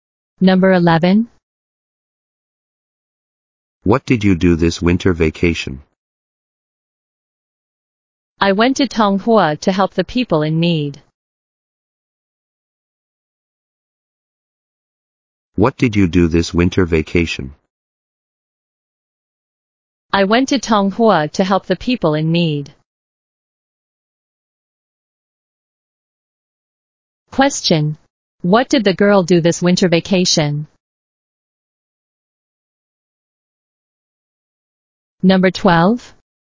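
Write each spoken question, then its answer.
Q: What did the girl do this winter vacation?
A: She went to Tonghua to help the people in need.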